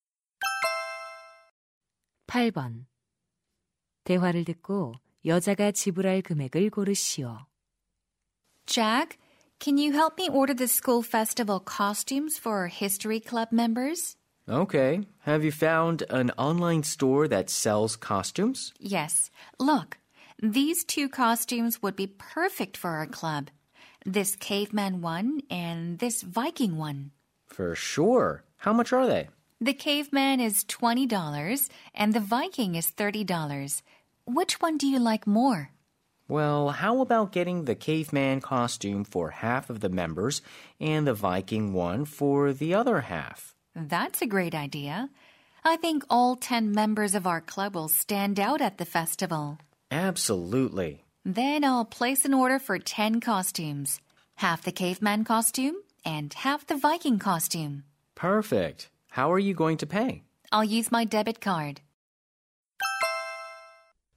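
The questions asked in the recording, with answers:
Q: 대화를 듣고 여자가 지불할 금액을 고르시오.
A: $250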